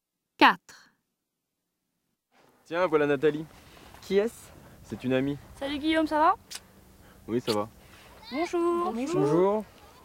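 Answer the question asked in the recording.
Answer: une amie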